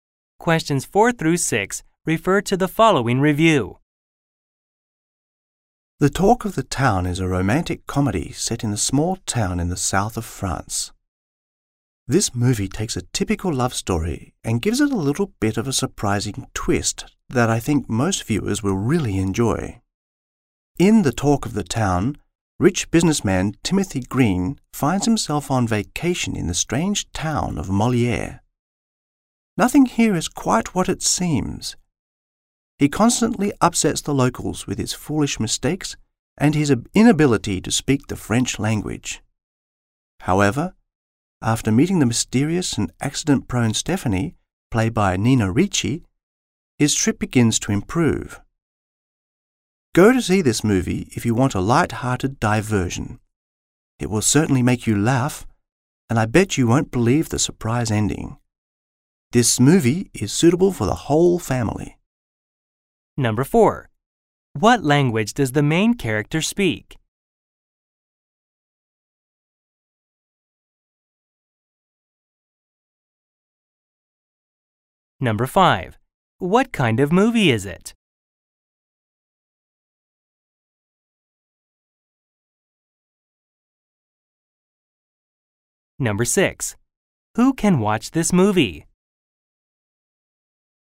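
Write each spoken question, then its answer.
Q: What kind of movie is it?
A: A romantic comedy

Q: Who can watch this movie?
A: The whole family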